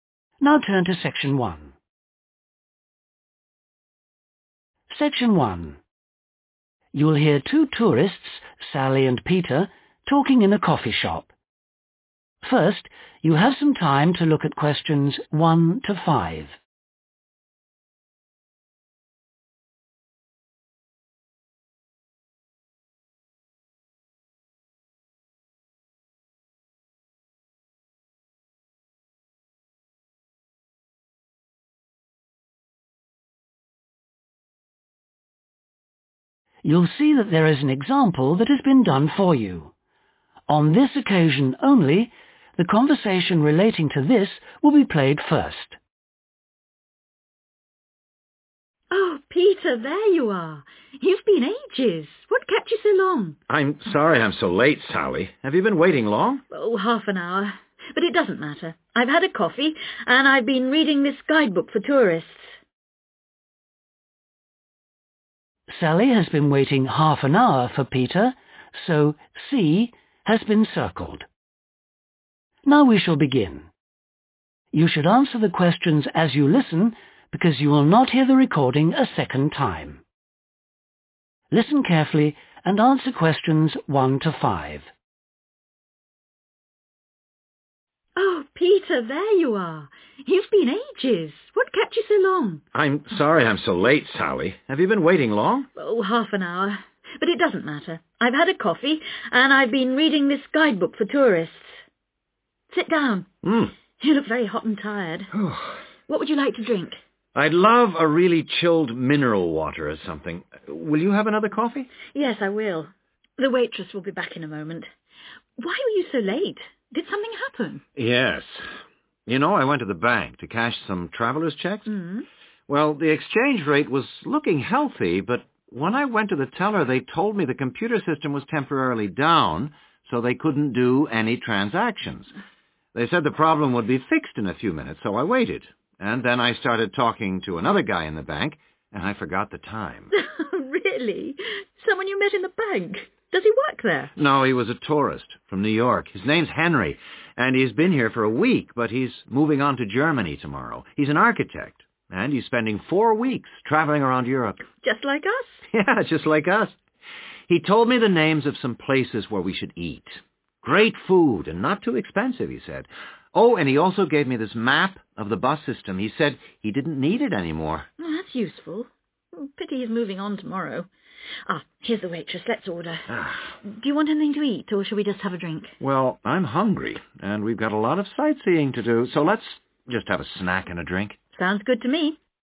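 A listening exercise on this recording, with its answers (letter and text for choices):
Choose the correct letter, A, B or C.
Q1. What does Peter want to drink?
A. tea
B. coffee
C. a cold drink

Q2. What caused Peter problems at the bank?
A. The exchange rate was down.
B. He was late.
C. The computers weren't working.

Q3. Who did Peter talk to at the bank?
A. an old friend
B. an American man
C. a German man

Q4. Henry gave Peter a map of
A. the city.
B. the bus routes.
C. the train system.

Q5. What do Peter and Sally decide to order?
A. food and drinks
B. just food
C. just drinks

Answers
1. C. a cold drink
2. C. The computers weren't working.
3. B. an American man
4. B. the bus routes.
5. A. food and drinks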